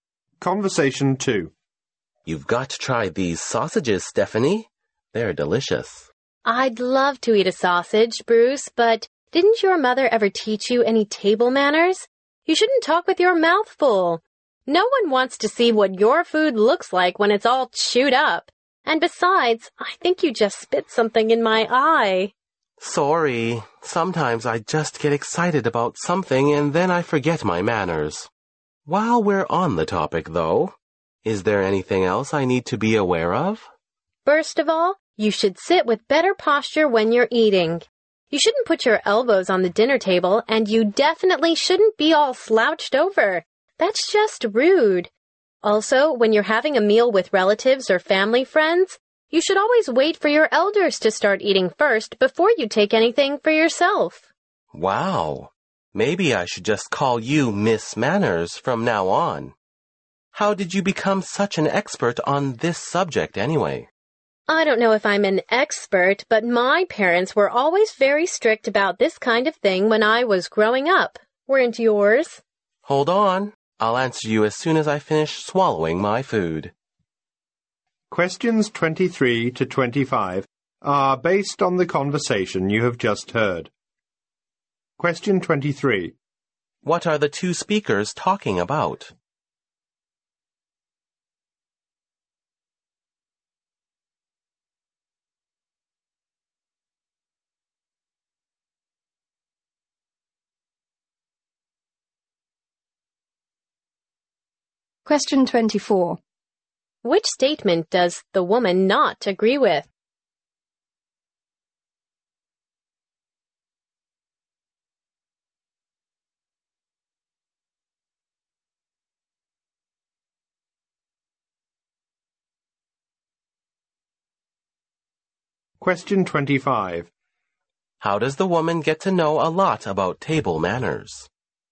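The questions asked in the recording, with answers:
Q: What are the two speakers talking about?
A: Table manners.

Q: How does the woman get to know a lot about table manners?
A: Her parents were very strict about it when she was growing up.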